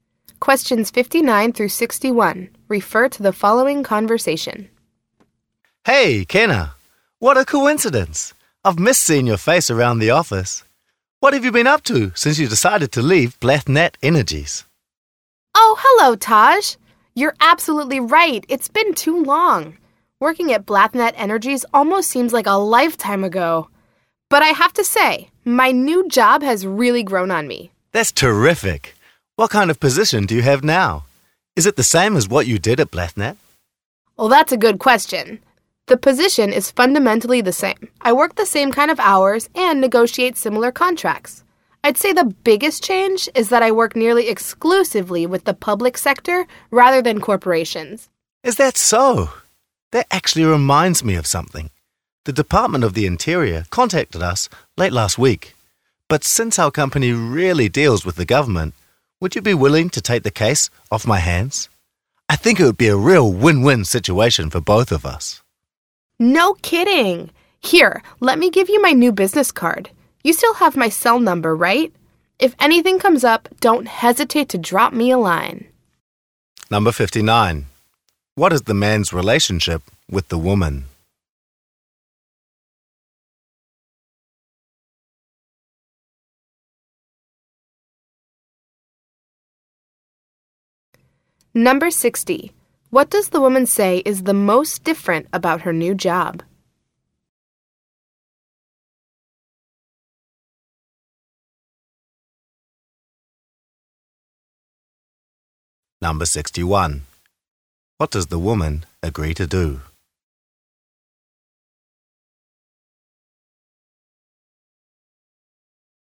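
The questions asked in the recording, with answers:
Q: What is the man's relationship with the woman?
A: Former coworkers

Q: What does the woman say is the most different about her new job?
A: She works mostly with the public sector rather than corporations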